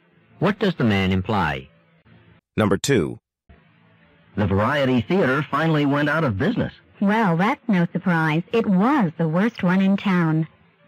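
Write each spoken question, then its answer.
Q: What does the woman mean?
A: She isn't surprised the theater closed because it was the worst in town.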